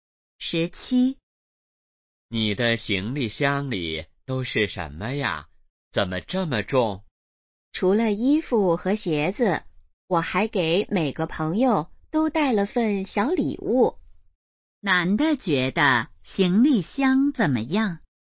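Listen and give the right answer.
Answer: 很重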